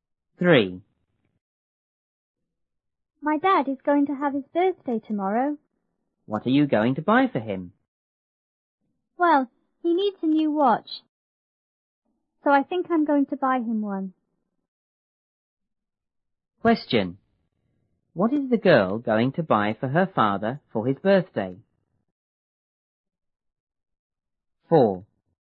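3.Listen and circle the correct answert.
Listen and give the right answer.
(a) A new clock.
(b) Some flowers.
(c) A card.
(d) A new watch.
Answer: (d) A new watch.

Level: 初中英语广州版1B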